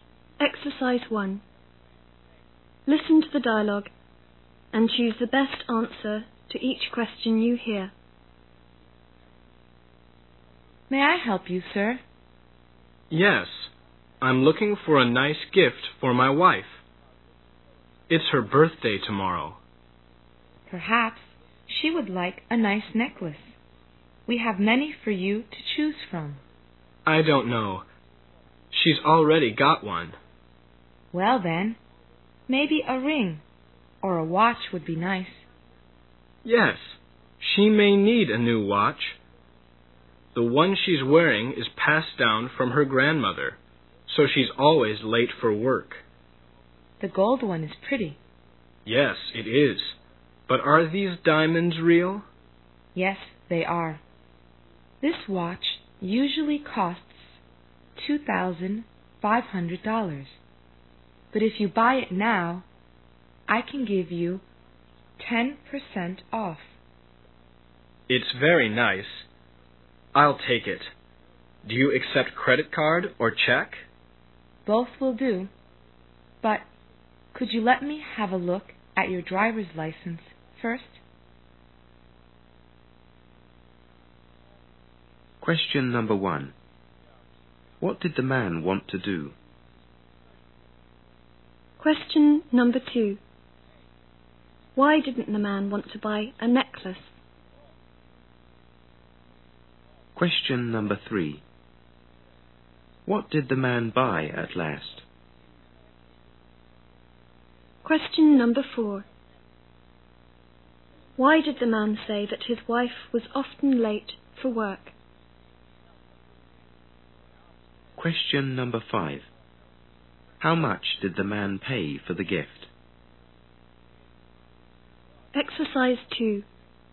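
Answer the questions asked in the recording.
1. Buy a birthday gift for his wife
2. His wife already has one
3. A gold watch with diamonds
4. Her old watch, passed down from her grandmother, doesn't keep good time
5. $2,250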